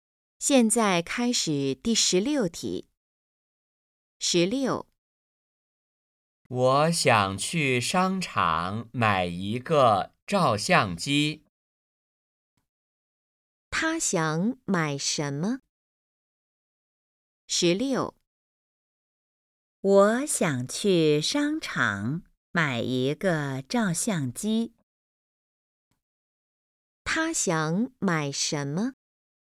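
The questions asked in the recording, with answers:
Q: 他想买什么?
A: 照相机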